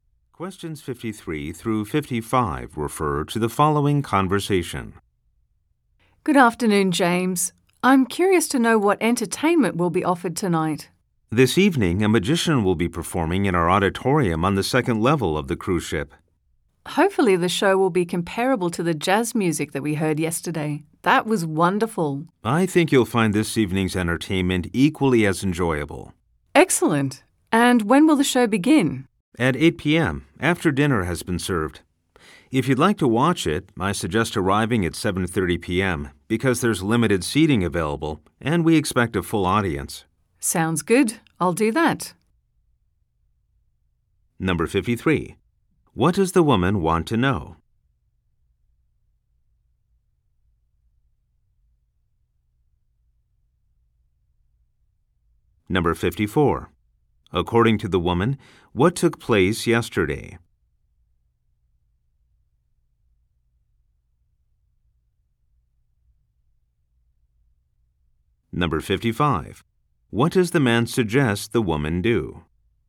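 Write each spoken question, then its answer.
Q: What does the woman want to know?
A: What entertainment is offered tonight

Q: According to the woman, what took place yesterday?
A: A jazz music performance

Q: What does the man suggest the woman do?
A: Arrive at 7:30 p.m.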